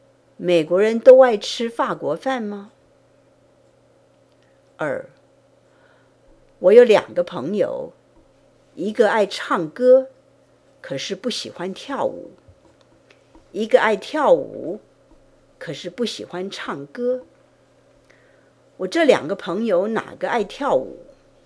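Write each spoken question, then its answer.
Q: 我这两个朋友哪个爱跳舞?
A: 不喜欢唱歌的那个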